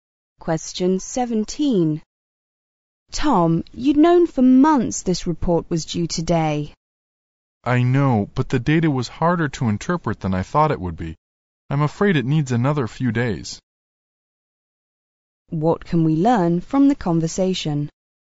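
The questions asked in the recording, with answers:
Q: What can we learn from the conversation?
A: Tom hasn't finished the report; he needs a few more days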